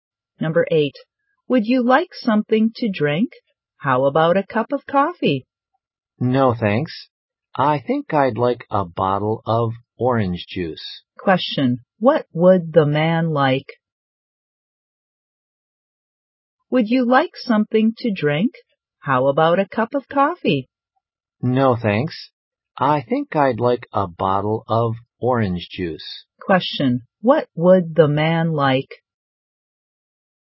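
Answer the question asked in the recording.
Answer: A bottle of orange juice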